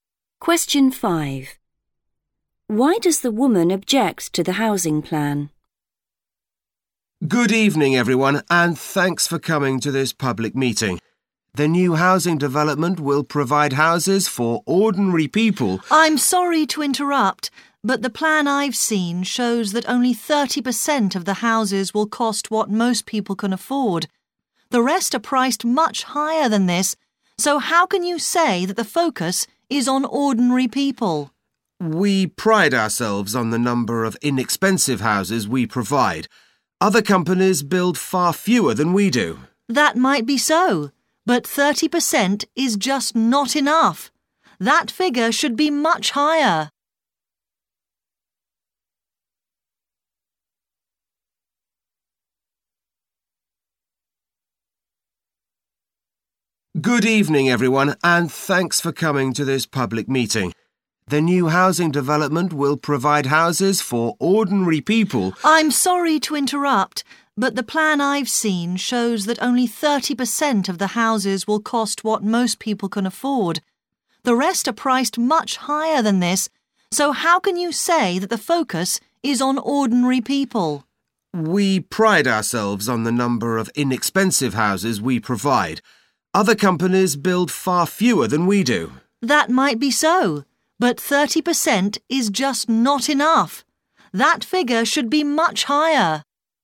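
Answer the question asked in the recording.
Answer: only 30% of the houses will be affordable, which is not enough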